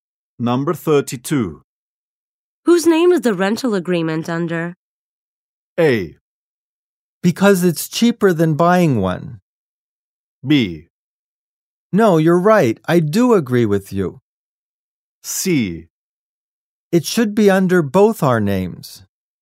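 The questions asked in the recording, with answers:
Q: Whose name is the rental agreement under?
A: C: It should be under both our names.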